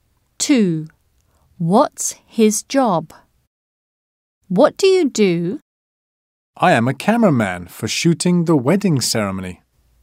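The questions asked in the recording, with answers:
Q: What's his job?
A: a cameraman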